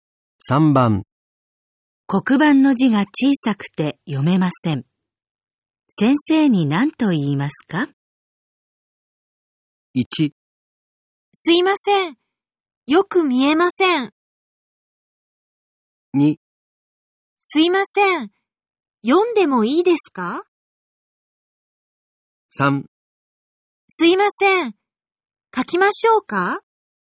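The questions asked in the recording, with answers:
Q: 黒板の字が小さくて読めません。先生に何と言いますか?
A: 1: すいません。よく見えません。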